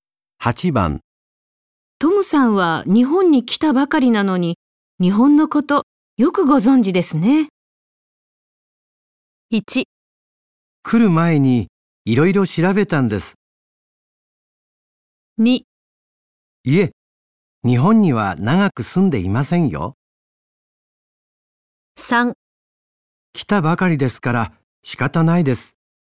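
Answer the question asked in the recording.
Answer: 1: 来る前にいろいろ調べたんです。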